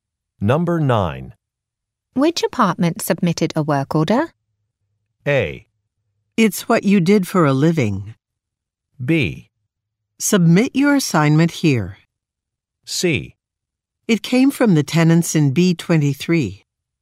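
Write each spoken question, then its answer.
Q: Which apartment submitted a work order?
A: C: It came from the tenants in B23.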